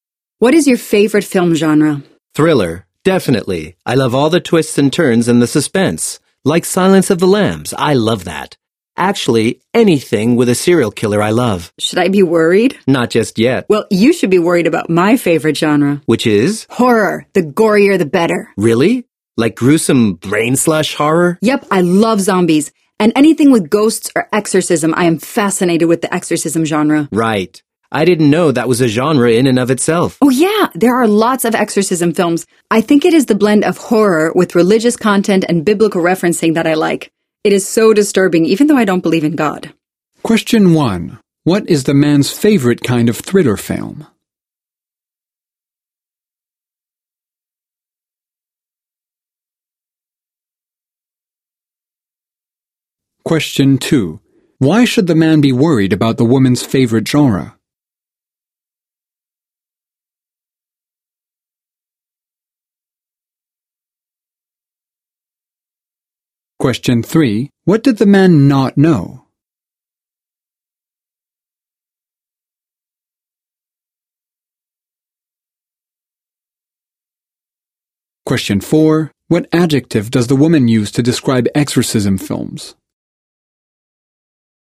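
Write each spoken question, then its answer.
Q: What is the man's favorite kind of thriller film?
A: Anything with a serial killer

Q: Why should the man be worried about the woman's favorite genre?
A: Because it is horror, the gorier the better

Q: What did the man not know?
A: That exorcism was a genre in itself

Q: What adjective does the woman use to describe exorcism films?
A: Disturbing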